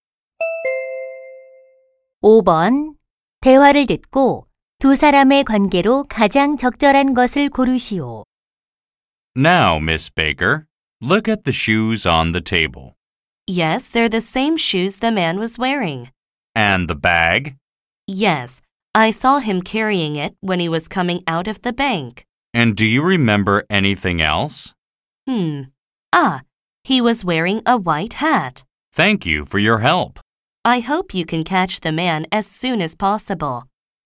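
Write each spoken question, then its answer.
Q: 대화를 듣고 두 사람의 관계로 가장 적절한 것을 고르시오.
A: 경찰관과 목격자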